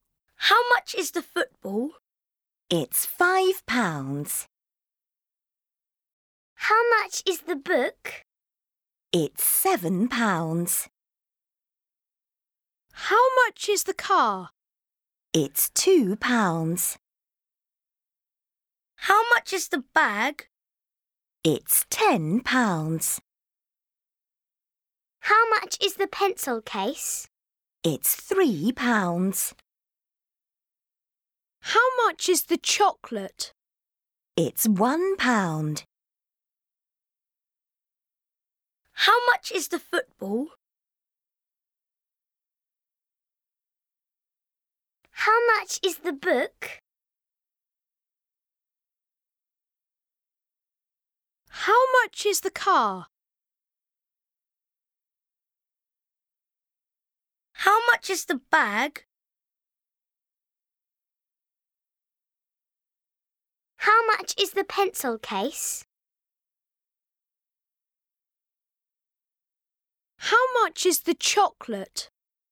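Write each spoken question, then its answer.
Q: How much is the bag?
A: £10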